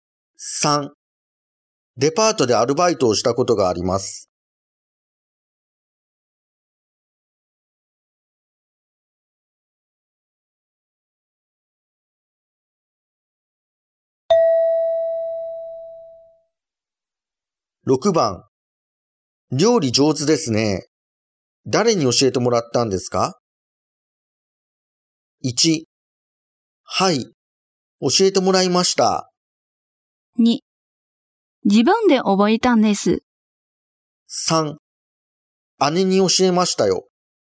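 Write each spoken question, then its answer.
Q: 料理上手ですね。誰に教えてもらったんですか?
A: 2: 自分で覚えたんです。

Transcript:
2
デパートへ行くところです。
3
デパートでアルバイトをしたことがあります。
1
はい、教えてもらいました。
2
自分で覚えたんです。
3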